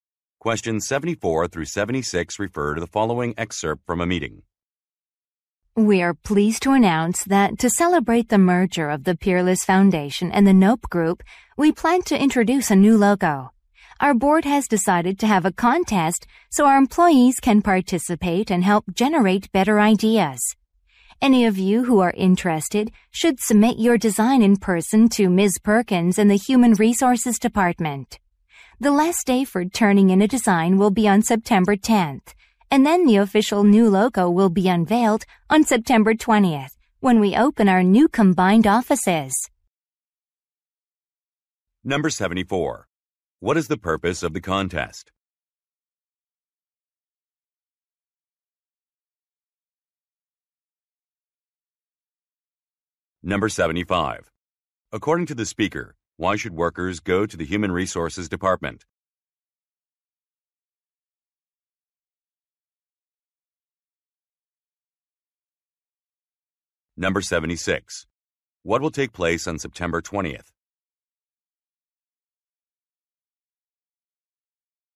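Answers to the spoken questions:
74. To create a new logo
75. To submit their designs
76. The new logo will be unveiled as the new combined offices open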